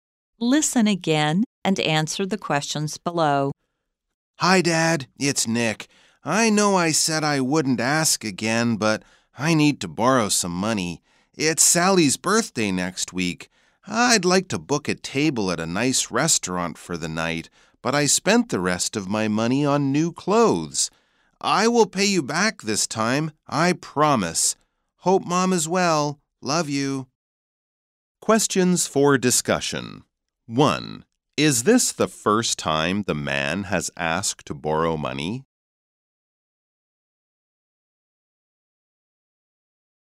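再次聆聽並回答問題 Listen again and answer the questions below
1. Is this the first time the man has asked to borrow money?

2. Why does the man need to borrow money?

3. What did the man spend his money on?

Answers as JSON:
{"1": "No, this is not the first time.", "2": "To book a table at a nice restaurant for Sally's birthday.", "3": "New clothes."}

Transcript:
Hi, Dad, it's Nick. I know I said I wouldn't ask again, but I need to borrow some money! It's Sally's birthday next week. I'd like to book a table at a nice restaurant for the night, but I spent the rest of my money on new clothes. I will pay you back this time; I promise!

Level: 中階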